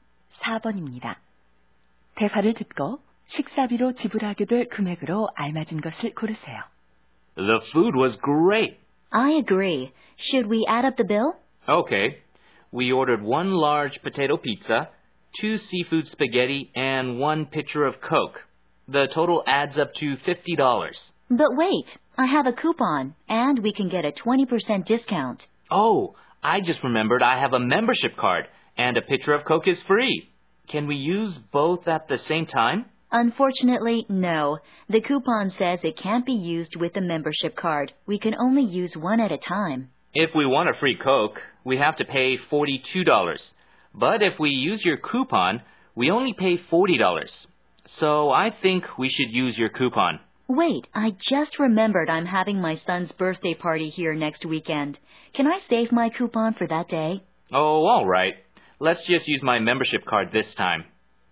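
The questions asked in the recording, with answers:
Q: 대화를 듣고 식사비로 지불하게 될 금액으로 알맞은 것을 고르세요.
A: 42달러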